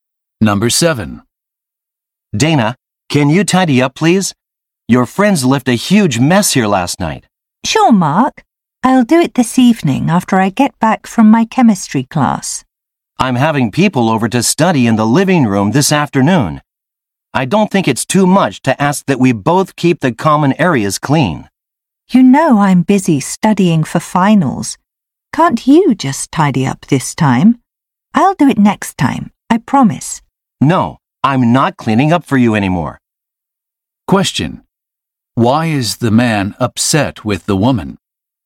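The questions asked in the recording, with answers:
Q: Why is the man upset with the woman?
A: She keeps expecting him to clean up after her and her friends.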